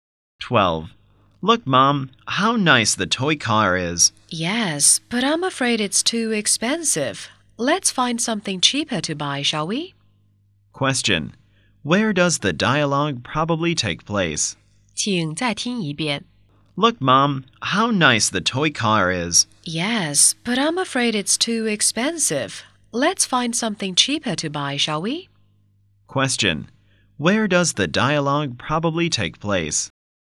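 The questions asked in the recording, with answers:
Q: Where does the dialogue probably take place?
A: In a (toy) shop.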